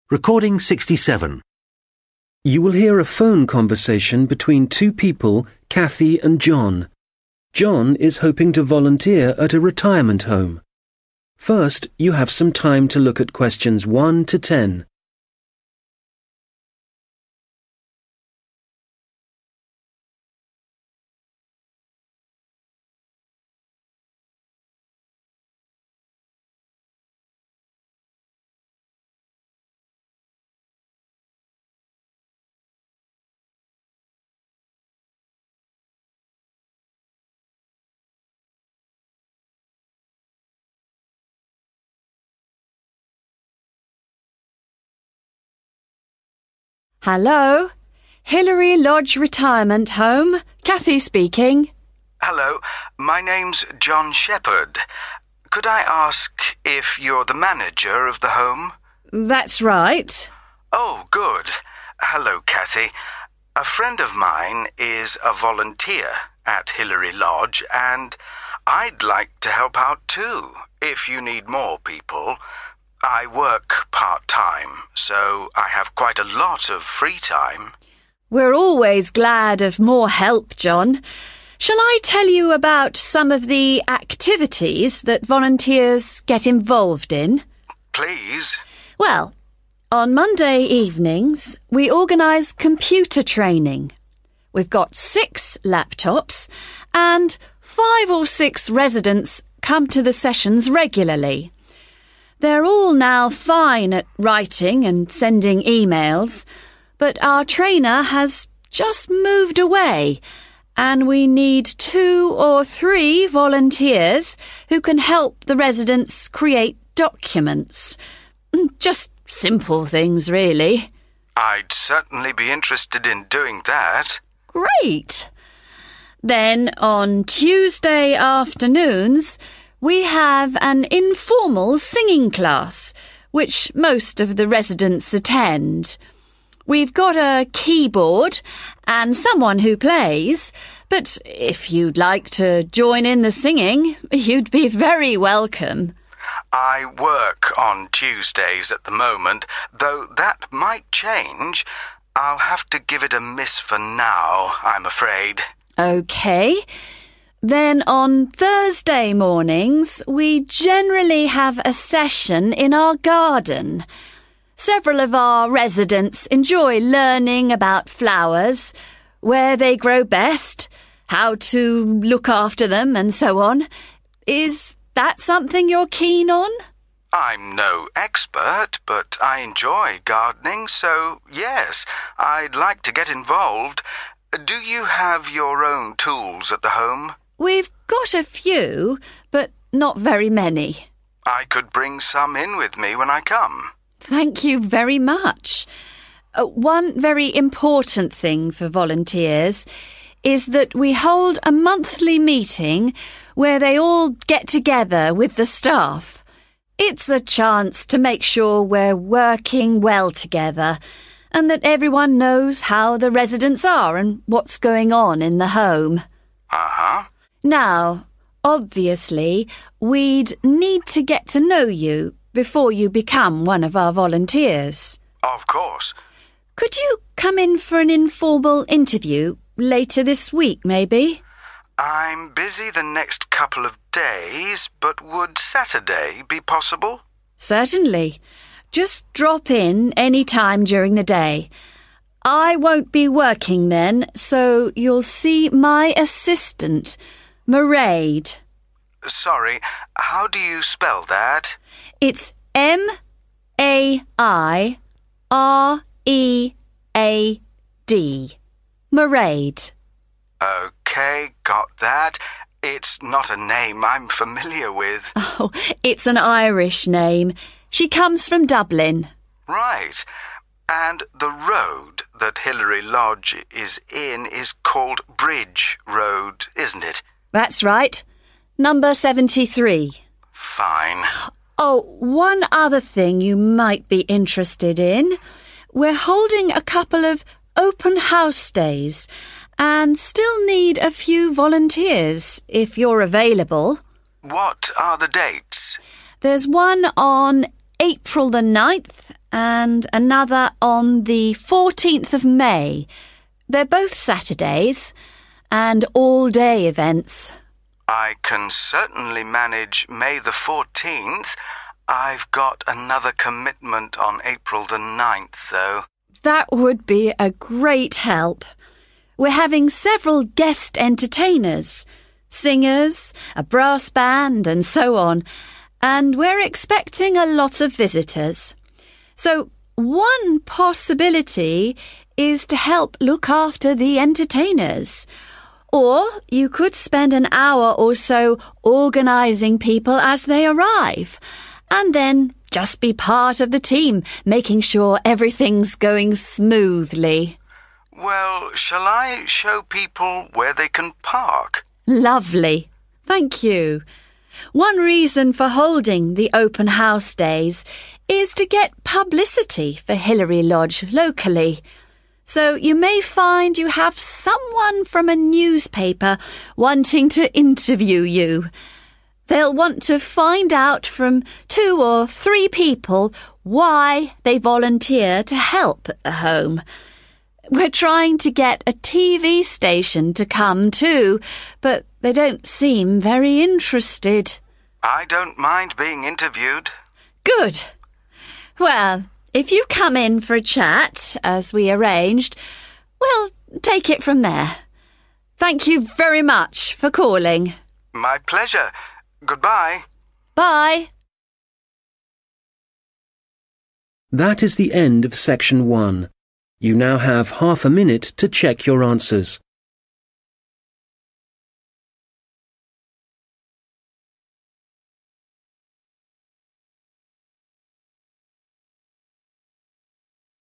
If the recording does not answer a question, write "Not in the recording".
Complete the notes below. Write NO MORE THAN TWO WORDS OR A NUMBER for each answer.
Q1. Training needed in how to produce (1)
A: Documents

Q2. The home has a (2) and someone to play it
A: keyboard

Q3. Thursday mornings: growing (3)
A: flowers

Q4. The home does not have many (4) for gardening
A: tools

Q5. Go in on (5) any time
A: saturday

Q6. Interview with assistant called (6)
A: Mairead

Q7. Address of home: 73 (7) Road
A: bridge

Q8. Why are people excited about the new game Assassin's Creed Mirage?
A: Not in the recording

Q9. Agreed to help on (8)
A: May 14

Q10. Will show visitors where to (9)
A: park

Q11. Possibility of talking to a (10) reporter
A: newspaper

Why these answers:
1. Sau produce → chắc chắn là một danh từ số nhiều Nội dung bài: "writing and sending emails" = kỹ năng đã có. Kỹ năng chưa có = create documents. "create" = đồng nghĩa với "produce" trong đề. ⇒ Đáp án đúng là documents
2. Câu hỏi nói về "singing" → từ cần điền là một loại nhạc cụ để đệm hát. Nội dung bài: Ở đây, Cathy nói rằng trung tâm tổ chức một lớp hát không chính thức cho người già. Để buổi hát diễn ra, họ có sẵn một nhạc cụ để đệm (keyboard). Có người đảm nhận việc chơi đàn, còn tình nguyện viên có thể tham gia hát cùng. ⇒ Đáp án đúng là keyboard
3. Sau growing → chắc chắn cần danh từ (thường ở số nhiều). Chủ đề là gardening → có thể là plants / vegetables / flowers. Nội dung bài: Hoạt động chính: garden session. Nội dung: học về flowers → nơi hoa phát triển, cách chăm sóc hoa. ⇒ Đáp án đúng là flower
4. Sau many → chắc chắn cần danh từ số nhiều. Chủ đề = gardening → khả năng là những vật dụng liên quan như: plants / seeds / tools. Nội dung bài: John hỏi trực tiếp về tools. Cathy xác nhận: "có một vài, nhưng không nhiều". ⇒ Đáp án đúng là tool
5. Sau on → chắc chắn là một ngày trong tuần hoặc ngày cụ thể. Nội dung bài: Cathy và John đang bàn về lịch phỏng vấn → đáp án sẽ là một ngày mà John có thể đến. John đề xuất: Saturday. Cathy đồng ý, và thêm rằng có thể đến "any time during the day". ⇒ Đáp án là Saturday
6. Sau called → chắc chắn cần một tên riêng (proper noun). Nội dung bài: Cathy nói John sẽ gặp trợ lý của bà → tên người. Cathy nói rõ tên trợ lý: Mairead. Bà còn đánh vần từng chữ M-A-I-R-E-A-D để chắc chắn John ghi đúng. ⇒ Đáp án là Mairead
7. Sau số nhà 73 + từ Road → chắc chắn cần tên riêng của con đường Nội dung bài: John xác nhận lại địa chỉ: Bridge Road. Cathy đồng ý và nhắc thêm số nhà: 73. ⇒ Đáp án là Bridge
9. Sau on → chắc chắn cần một mốc thời gian cụ thể (ngày/tháng). Nội dung bài: Ngữ cảnh là "open house days" → là ngày sự kiện mà John đồng ý tham gia. Có 2 ngày open house: April 9th và May 14th. John nói rõ: chỉ tham gia được vào May 14th, còn ngày 9/4 thì bận. ⇒ Đáp án là May 14
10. Sau to → chắc chắn cần động từ nguyên thể. Nội dung bài: Sự kiện "open house days" → khách đến đông → cần người hướng dẫn John chủ động đề xuất nhiệm vụ: hướng dẫn khách đỗ xe. Cathy đồng ý ngay. ⇒ Đáp án là park
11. Sau a + trước reporter → chắc chắn cần một danh từ chỉ loại hình báo chí / truyền thông. Nội dung bài: Cathy nói: có thể sẽ có người từ một tờ báo (a newspaper) đến phỏng vấn. ⇒ Đáp án là newspaper

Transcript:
John: Hello, my name's John Shepherd. Could I ask if you're the manager of the home?
Cathy: That's right.
John: Oh, good. A friend of mine is a volunteer at Hilary Lodge, and I'd like to help out, too, if you need more people. I work part-time, so I have quite a lot of free time.
Cathy: We're always glad for more help, John. Shall I tell you about some of the activities that volunteers get involved in?
John: Please.
Cathy: Well, on Monday evenings we organize computer training. We've got six laptops, and five or six residents come to the sessions regularly. They're all now fine at writing and sending emails, but our trainer has just moved away, and we need two or three volunteers who can help the residents create documents. Just simple things, really.
John: I'd certainly be interested in doing that.
Cathy: Great. Then on Tuesday afternoons, we have an informal singing class, which most of the residents attend. We've got a keyboard, and someone who plays, but if you'd like to join in the singing, you'd be very welcome.
John: I work on Tuesdays at the moment, though that might change. I'll have to give it a miss for now, I'm afraid.
Cathy: OK. Then on Thursday mornings we generally have a session in our garden. Several of our residents enjoy learning about flowers, where they grow best, how to look after them, and so on. Is that something you're keen on?
John: I'm no expert, but I enjoy gardening, so yes, I'd like to get involved. Do you have your own tools at the home?
Cathy: We've got a few, but not very many.
John: I could bring some in with me when I come.
Cathy: Thank you very much. One very important thing for volunteers is that we hold a monthly meeting where they all get together with the staff. It's a chance to make sure we're working well together, and that everyone knows how the residents are, and what's going on in the home.
Cathy: Now obviously we'd need to get to know you before you become one of our volunteers.
John: Of course.
Cathy: Could you come in for an informal interview – later this week, maybe?
John: I'm busy the next couple of days, but would Saturday be possible?
Cathy: Certainly. Just drop in any time during the day. I won't be working then, so you'll see my assistant, Mairead.
John: Sorry, how do you spell that?
Cathy: It's M-A-I-R-E-A-D, Mairead.
John: OK, got that. It's not a name I'm familiar with.
Cathy: It's an Irish name. She comes from Dublin.
John: Right. And the road that Hilary Lodge is in is called Bridge Road, isn't it?
Cathy: That's right. Number 73.
John: Fine.
Cathy: Oh, one other thing you might be interested in – we're holding a couple of 'open house' days, and still need a few volunteers, if you're available.
John: What are the dates?
Cathy: There's one on April 9th and another on 14th May. They're both Saturdays and all-day events.
John: I can certainly manage May 14th. I've got another commitment on April 9th, though.
Cathy: That would be a great help. We're having several guest entertainers – singers, a brass band, and so on- and we're expecting a lot of visitors. So one possibility is to help look after the entertainers, or you could spend an hour or so organizing people as they arrive, and then just be part of the team making sure everything's going smoothly.
John: Well, shall I show people where they can park?
Cathy: Lovely. Thank you. One reason for holding the open house days is to get publicity for Hilary Lodge locally. So you may find you have someone from a newspaper wanting to interview you. They'll want to find out from two or three people why they volunteer to help at the home. We're trying to get a TV station to come, too, but they don't seem very interested.
John: I don't mind being interviewed.
Cathy: Good. Well, if you come in for a chat, as we arranged, we'll take it from there.